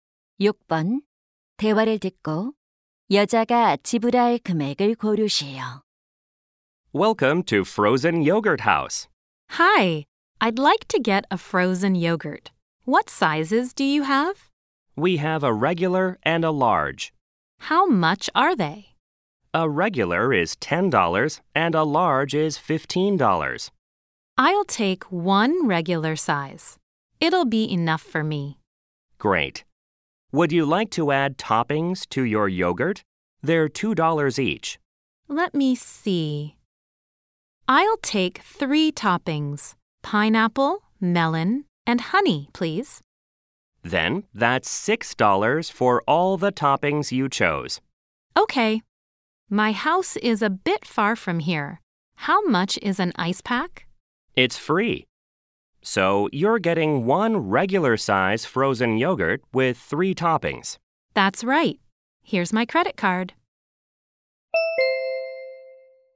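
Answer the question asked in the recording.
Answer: $16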